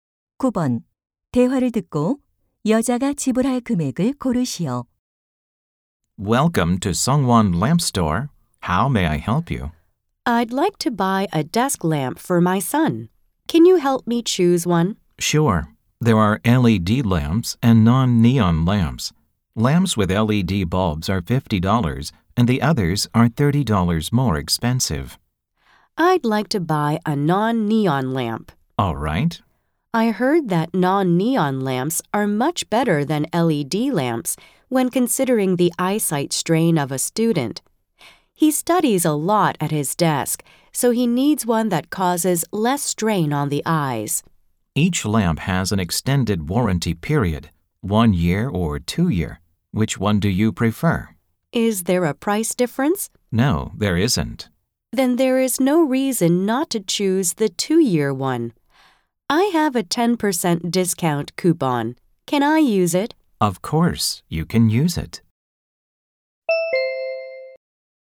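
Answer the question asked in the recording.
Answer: $72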